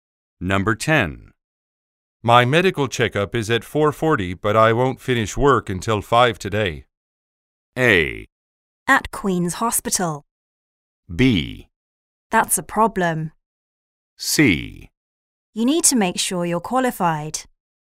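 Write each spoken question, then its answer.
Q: My medical checkup is at 4:40, but I won't finish work until 5 today.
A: B: That's a problem.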